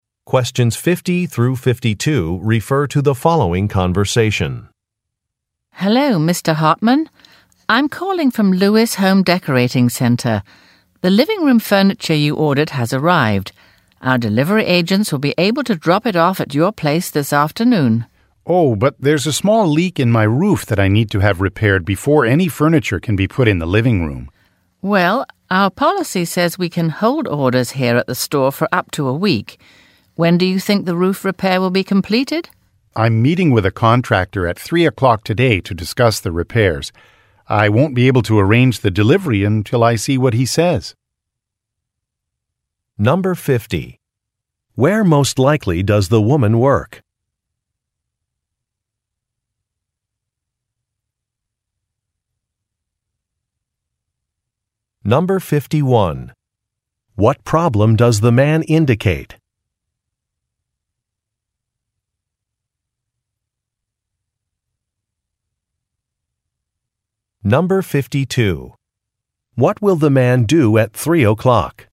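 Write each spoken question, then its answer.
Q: Where most likely does the woman work?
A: At a home decorating center (Lewis Home Decorating Center)

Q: What problem does the man indicate?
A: His roof has a small leak that needs repair

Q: What will the man do at 3 o'clock?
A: Meet with a contractor to discuss the roof repairs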